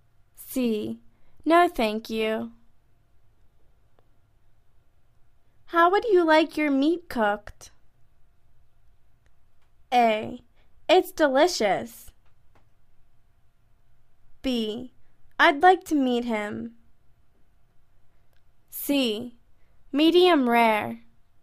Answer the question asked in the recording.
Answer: Medium rare.